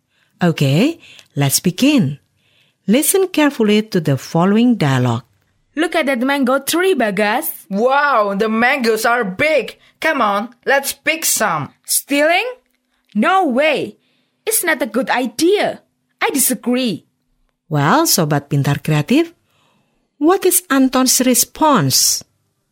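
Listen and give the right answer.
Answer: Disagreeing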